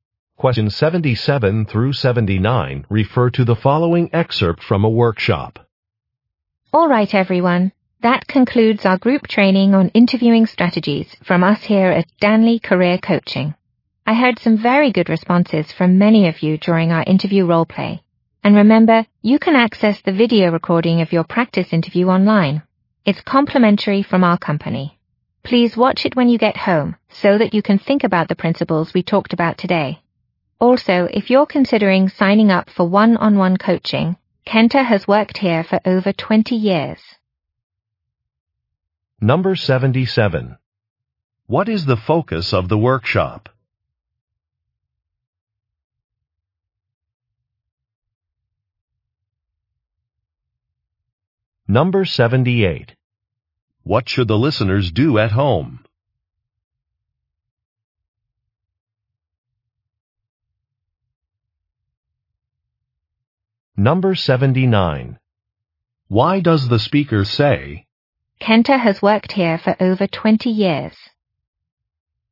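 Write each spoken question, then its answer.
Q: What is the focus of the workshop?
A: Interviewing strategies

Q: What should the listeners do at home?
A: Watch the video recording of their practice interview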